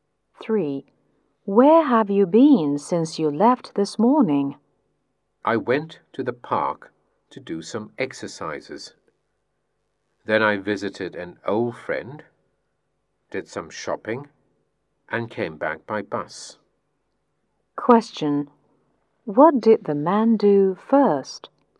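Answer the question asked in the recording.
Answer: He did some exercises in the park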